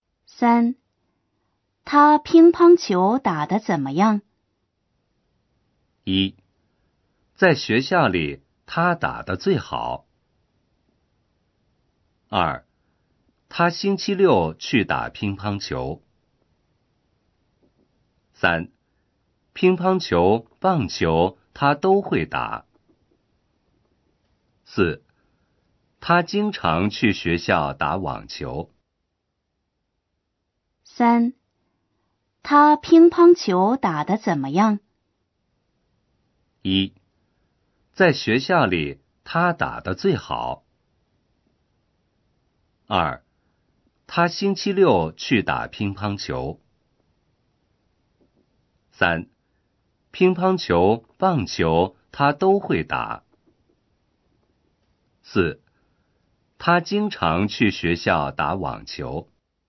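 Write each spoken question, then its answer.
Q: 他乒乓球打得怎么样?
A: 1: 在学校里他打得最好。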